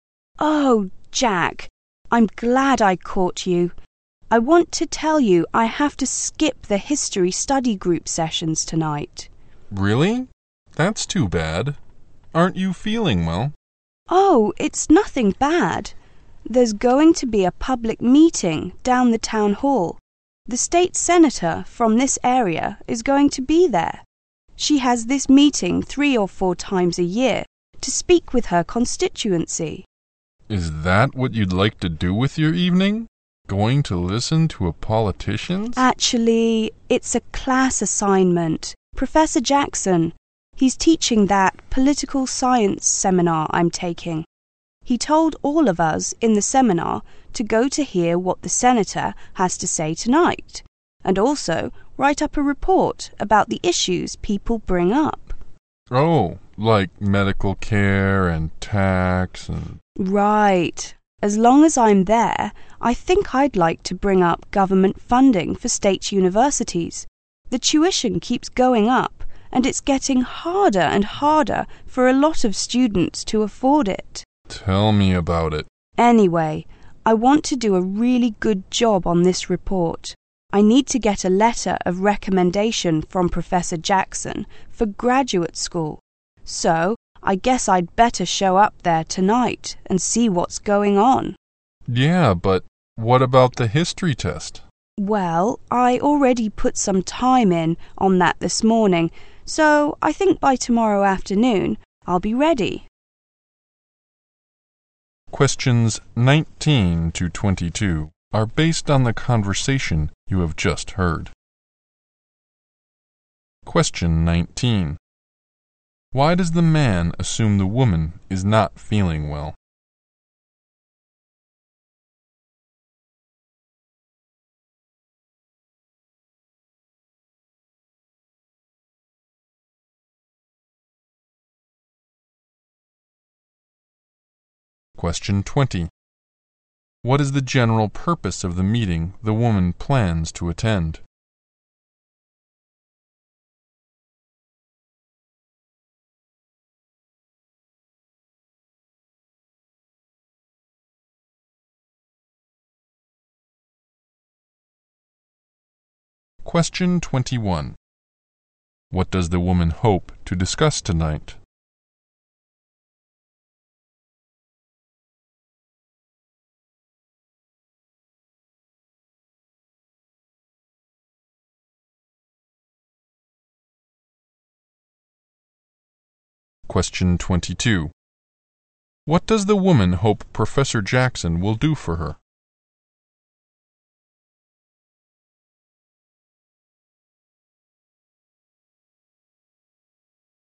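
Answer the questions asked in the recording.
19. Because she says she will skip the history study group session tonight.
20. For the state senator to speak with her constituents.
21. Government funding for state universities.
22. Write her a letter of recommendation for graduate school.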